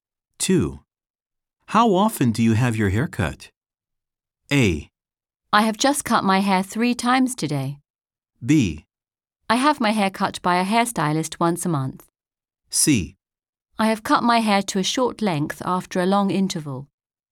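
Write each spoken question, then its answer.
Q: How often do you have your hair cut?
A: B: I have my hair cut by a hairstylist once a month.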